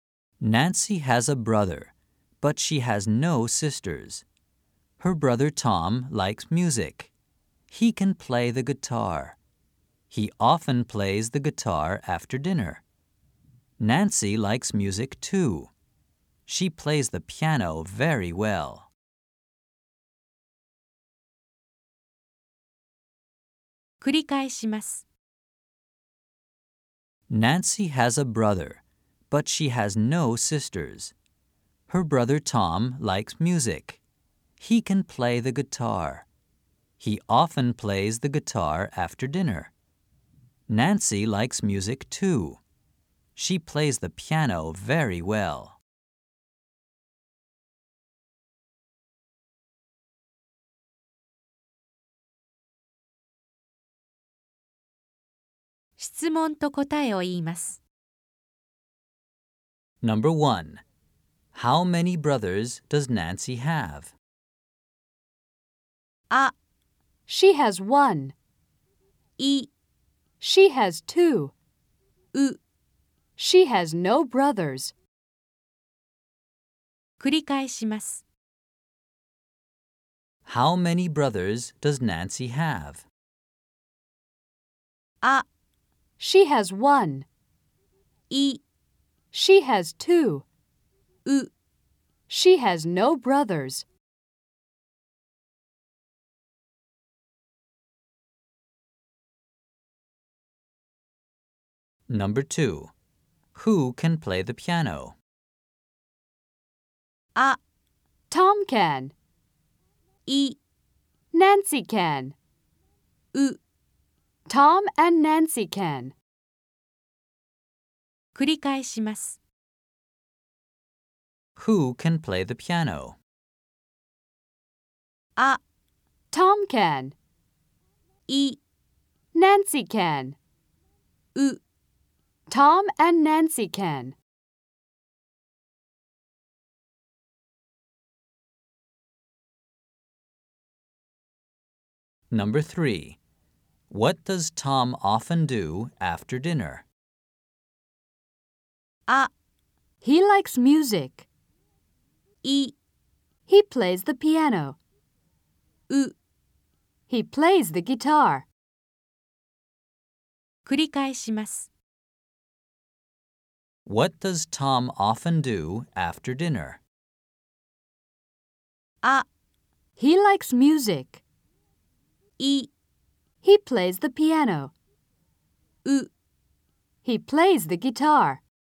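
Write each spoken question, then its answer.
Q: How many brothers does Nancy have?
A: あ: She has one.

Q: Who can play the piano?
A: い: Nancy can.

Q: What does Tom often do after dinner?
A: う: He plays the guitar.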